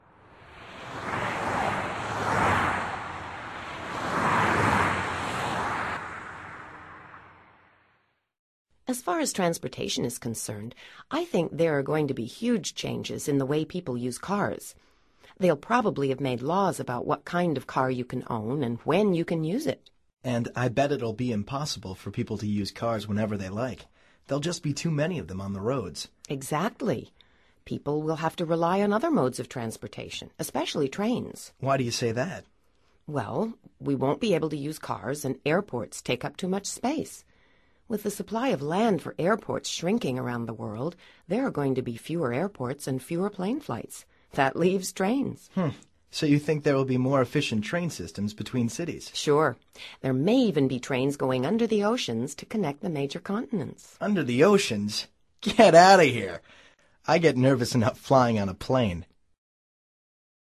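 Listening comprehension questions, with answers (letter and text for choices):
Activity 121: Basándote en los comentarios anteriores, selecciona las opciones más adecuadas. Verifica luego las respuestas correctas.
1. Dialogue # 3 suggests that ...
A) there will be more airports and fewer trains.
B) there will be fewer airports and more trains.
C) trains will run under the rivers to connect cities.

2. Dialogue # 3 also suggests that ...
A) there will be laws about using your car.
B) there won't be laws about which car to buy.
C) there will be promotions for ecological cars.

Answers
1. B) there will be fewer airports and more trains.
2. A) there will be laws about using your car.

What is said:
As far as transportation is concerned, I think there're going to be huge changes in the way people use cars. They'll probably have made laws about what kind of car you can own and when you can use it.
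And I bet it'll be impossible for people to use cars whenever they like. There'll be just too many of them on the roads.
Exactly. People will have to rely on other modes of transportation – especially trains.
Why do you say that?
Well, we won't be able to use cars, and airports take up too much space. With the supply of land for airports shrinking around the world, there are going to be fewer airports and fewer plane flights. That leaves trains.
Huh. So do you think there will be more efficient train-systems between cities?
Sure. There may even be trains going under the oceans to connect the major continents.
Under the oceans? Get out of here! I get nervous enough flying on a plane.

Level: Nivel Avanzado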